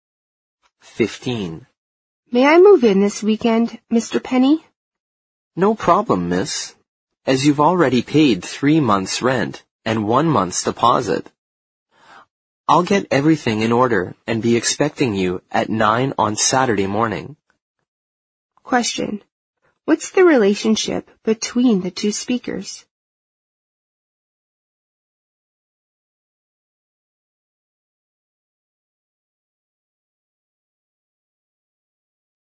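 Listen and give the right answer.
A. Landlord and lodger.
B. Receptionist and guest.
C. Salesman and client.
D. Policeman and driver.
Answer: A. Landlord and lodger.

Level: 四级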